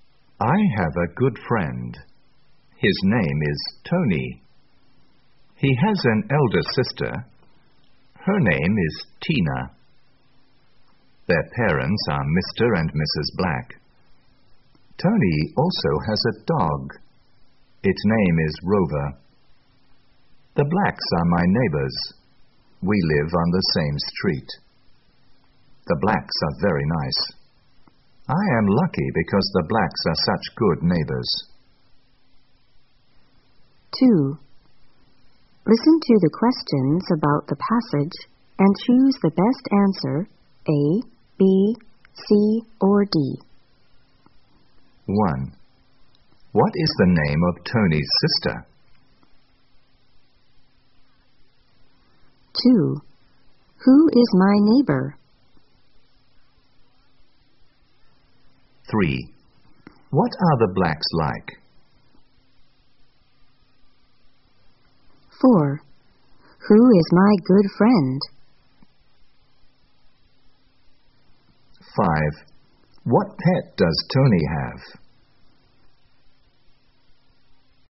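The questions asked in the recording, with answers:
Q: What is the name of Tony's sister?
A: Tina

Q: Who is my neighbor?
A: The Blacks

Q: What are the Blacks like?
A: Very nice

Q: Who is my good friend?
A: Tony

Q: What pet does Tony have?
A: A dog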